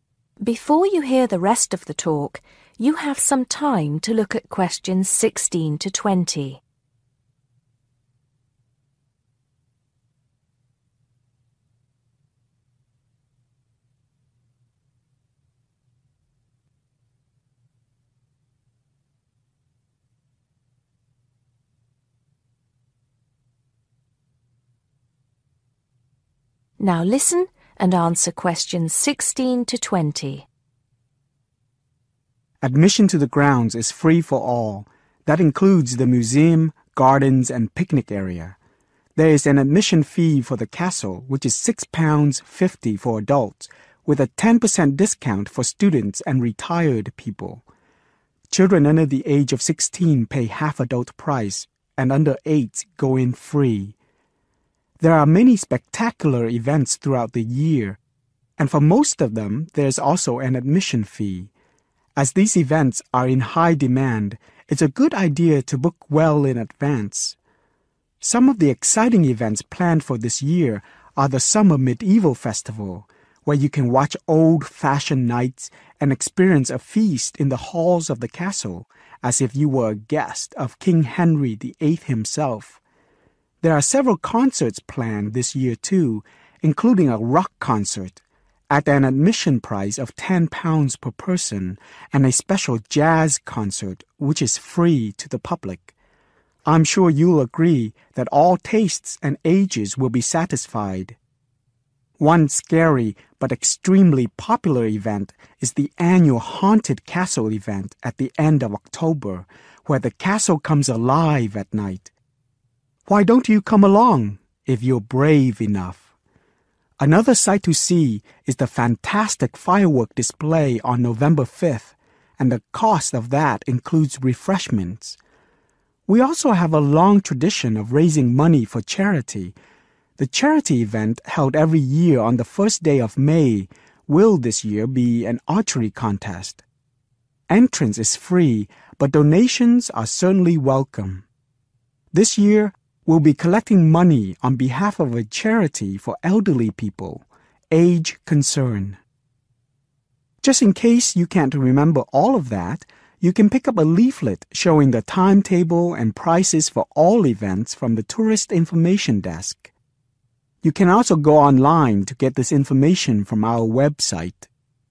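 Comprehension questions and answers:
Which THREE activities or events do you need to pay to get in? Choose THREE letters A-F.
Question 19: How often is the charity event held?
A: every year

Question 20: Who does the Age Concern help?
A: elderly people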